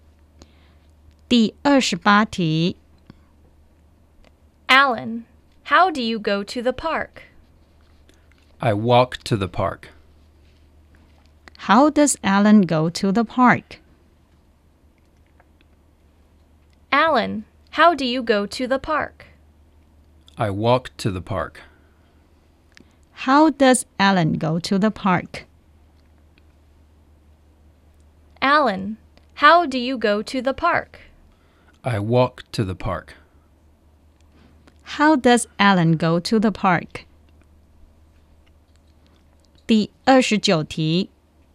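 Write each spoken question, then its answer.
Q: How does Alan go to the park?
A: He walks to the park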